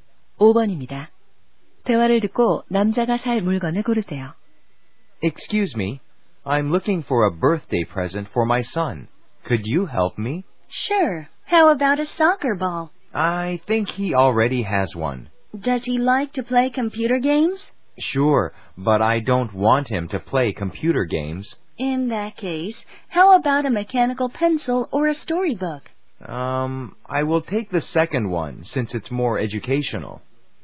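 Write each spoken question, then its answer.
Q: 대화를 듣고 남자가 살 물건을 고르세요.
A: 동화책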